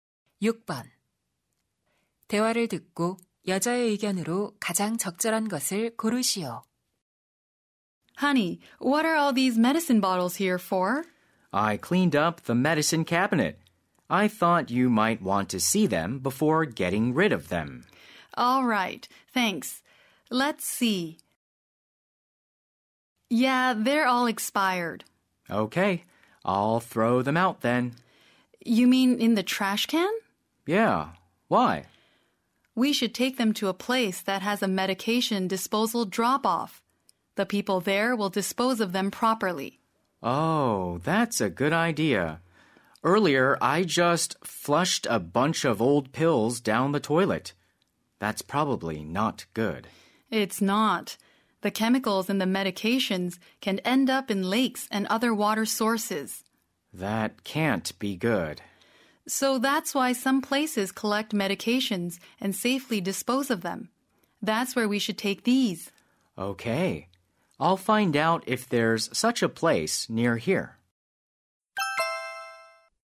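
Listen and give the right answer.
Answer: 유통기한이 지난 약은 수거 장소에 가져가 안전하게 폐기해야 한다.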